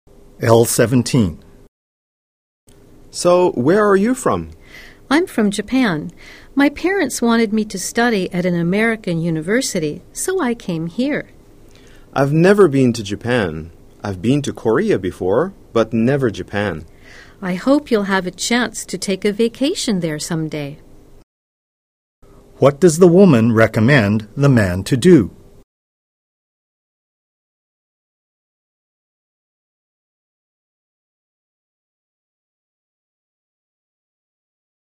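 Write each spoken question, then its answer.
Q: What does the woman recommend the man to do?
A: Take a vacation in Japan someday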